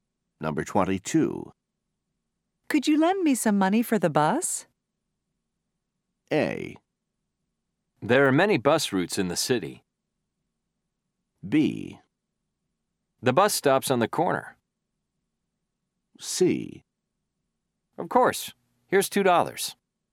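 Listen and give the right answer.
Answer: C: Of course. Here's $2.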